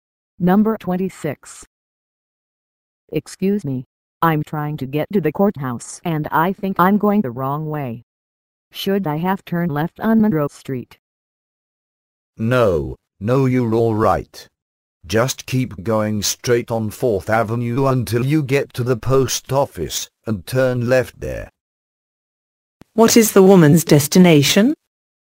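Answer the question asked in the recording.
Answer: The courthouse.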